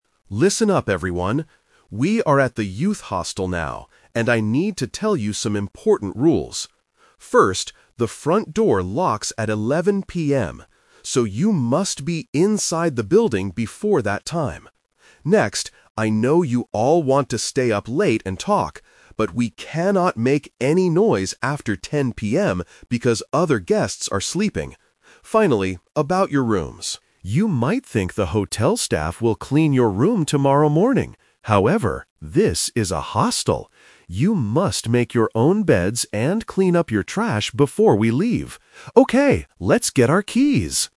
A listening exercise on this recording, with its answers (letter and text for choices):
Listen to a teacher talking to a group of students at a hostel. Choose the correct answer (A, B, or C) for each question.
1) What happens at 11 PM?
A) The students must go to sleep.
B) The front door locks.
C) The hostel staff goes home.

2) What is the rule about making noise?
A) They can talk loudly all night.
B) They must be quiet after 10 PM.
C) They cannot talk in the morning.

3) What do the students have to do tomorrow morning? (The Twist)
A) Wait for the staff to clean the room.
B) Make their own beds.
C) Pay for their rooms.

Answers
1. B) The front door locks.
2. B) They must be quiet after 10 PM.
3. B) Make their own beds.

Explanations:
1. The teacher explicitly says, "First, the front door locks at 11 PM." Trap: Option A is a trap because the teacher mentions 10 PM for the "no noise" rule, not 11 PM. Option C is plausible for a hostel but is never mentioned in the audio.
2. The teacher tells the students, "we cannot make any noise after 10 PM." Trap: Option A is what the students want to do ("I know you all want to stay up late and talk"), but it is rejected by the teacher. Option C is not mentioned.
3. This is the Twist. The students might expect a cleaning service, but the teacher says, "However, this is a hostel. You must make your own beds..." Trap: Option A is exactly what the teacher warns them not to expect ("You might think the hotel staff will clean your room... However..."). Option C is a typical hotel action but is not mentioned as a task for the students.

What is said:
Teacher: Listen up, everyone! We are at the youth hostel now, and I need to tell you some important rules. First, the front door locks at 11 PM. So, you must be inside the building before that time. Next, I know you all want to stay up late and talk. But, we cannot make any noise after 10 PM because other guests are sleeping. Finally, about your rooms. You might think the hotel staff will clean your room tomorrow morning. However, this is a hostel. You must make your own beds and clean up your trash before we leave. Okay, let's get our keys!